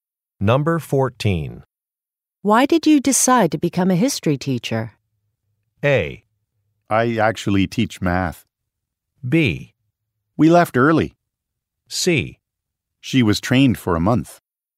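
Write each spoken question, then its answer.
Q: Why did you decide to become a history teacher?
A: A: I actually teach math.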